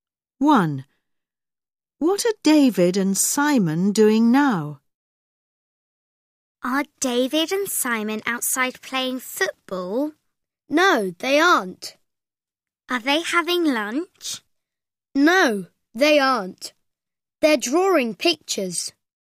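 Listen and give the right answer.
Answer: They're drawing pictures.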